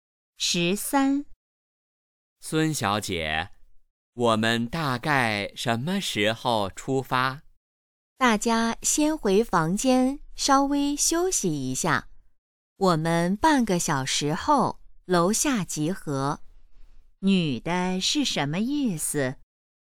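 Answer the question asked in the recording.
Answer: 先休息,半小时后集合出发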